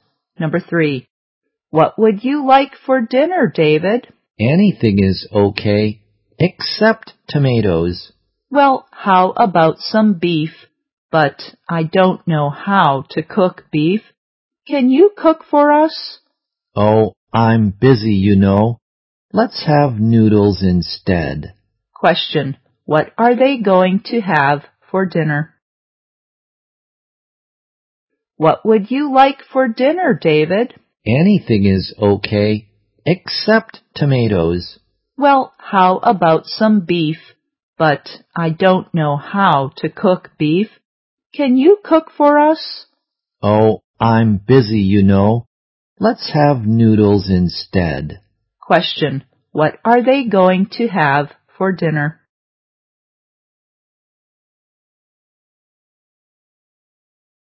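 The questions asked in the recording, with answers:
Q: What are they going to have for dinner?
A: Noodles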